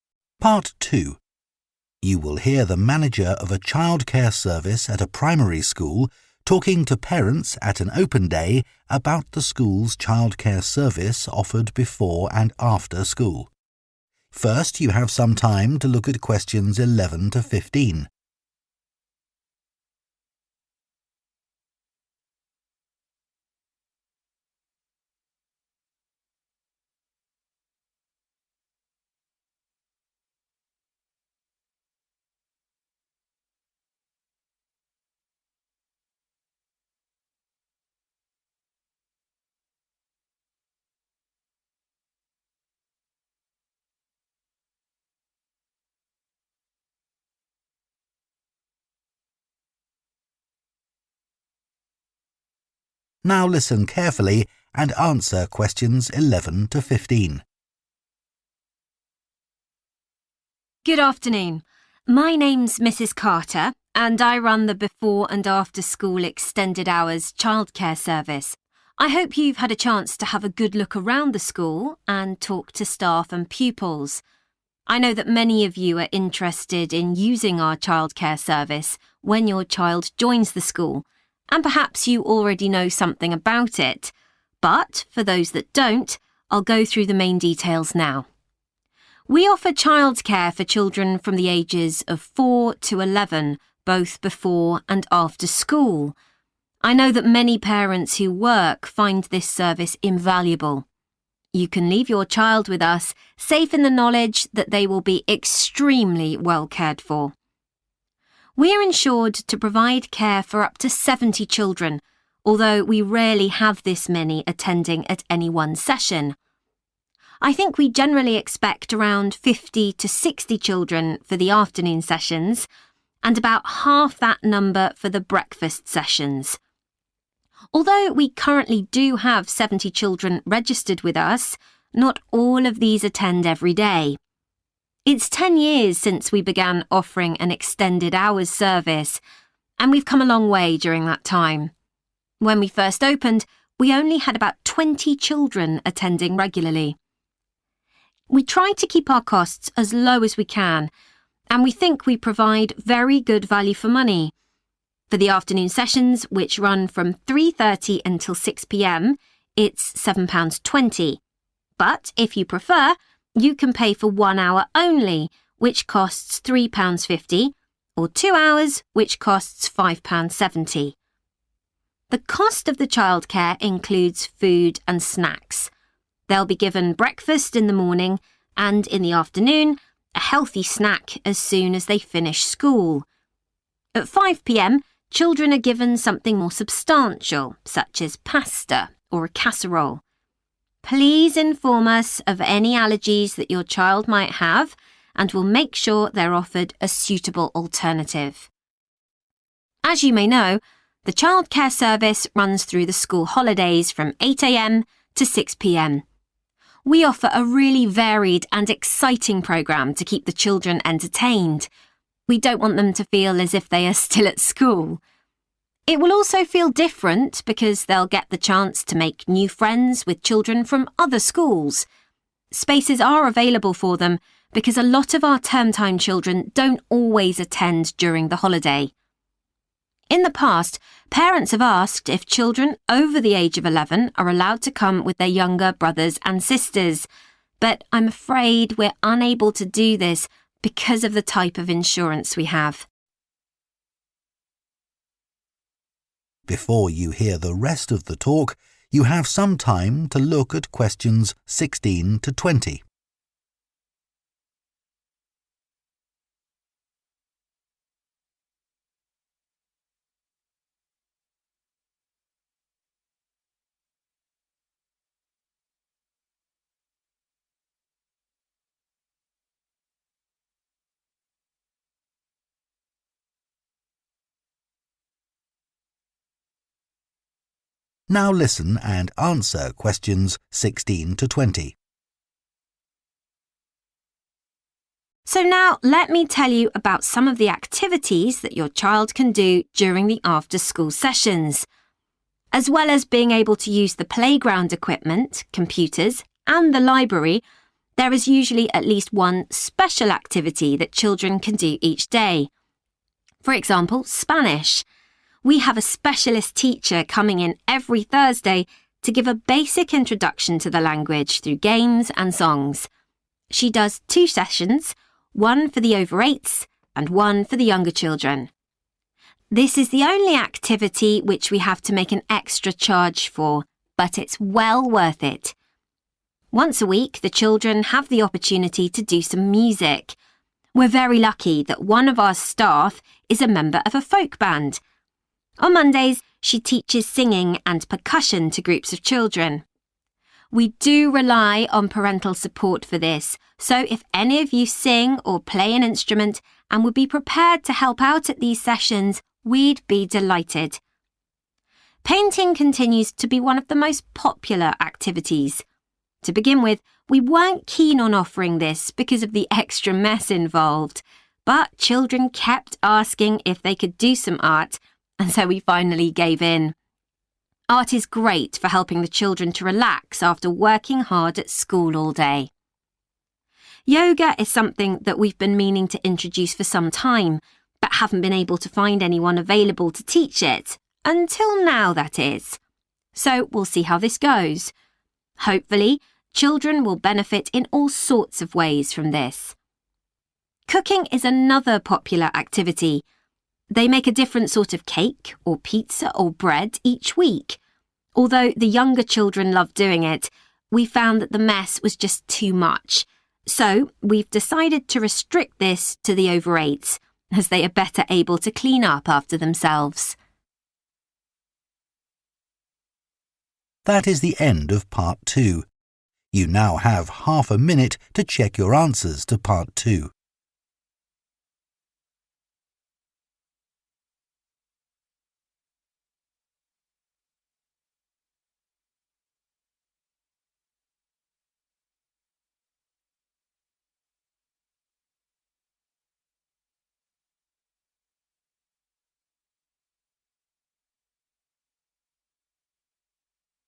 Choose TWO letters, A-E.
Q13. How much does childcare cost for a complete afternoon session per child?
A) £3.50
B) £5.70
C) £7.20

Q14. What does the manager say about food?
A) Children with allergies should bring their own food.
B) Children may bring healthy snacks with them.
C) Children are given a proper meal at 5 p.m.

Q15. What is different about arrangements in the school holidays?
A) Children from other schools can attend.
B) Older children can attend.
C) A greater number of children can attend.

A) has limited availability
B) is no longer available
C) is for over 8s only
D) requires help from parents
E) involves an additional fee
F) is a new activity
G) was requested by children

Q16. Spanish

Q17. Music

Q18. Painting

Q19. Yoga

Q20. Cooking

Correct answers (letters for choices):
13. C
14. C
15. A
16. E
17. D
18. G
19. F
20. C